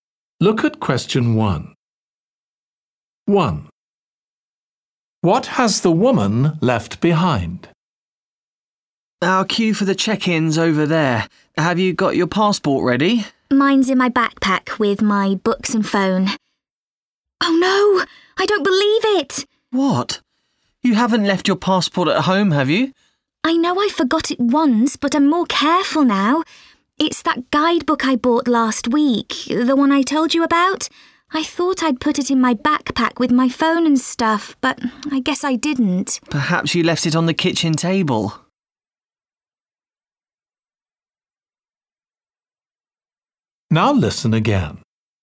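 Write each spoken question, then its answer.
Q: What has the woman left behind?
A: a guidebook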